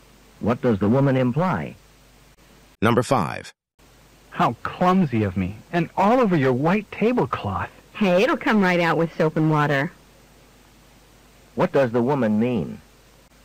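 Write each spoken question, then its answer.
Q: What does the woman mean?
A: The stain will wash out easily, so it's no problem.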